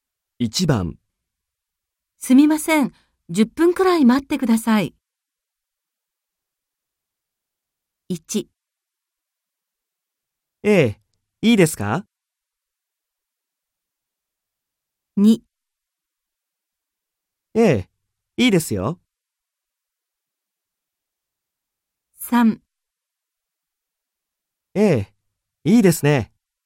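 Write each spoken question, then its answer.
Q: すみません、10分くらい待ってください。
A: 2: ええ、いいですよ。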